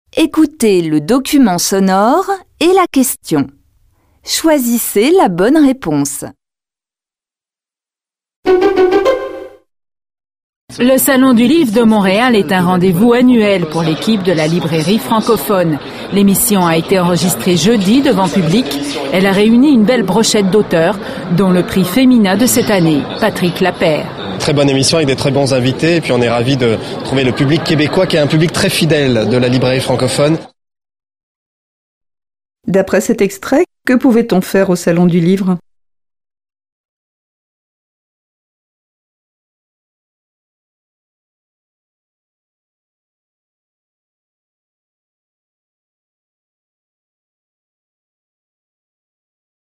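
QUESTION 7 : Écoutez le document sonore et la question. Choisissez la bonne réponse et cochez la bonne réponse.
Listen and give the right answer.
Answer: Assister à l'enregistrement public d'une émission avec des auteurs.

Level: Tăng dần từ trình độ A1 đến C1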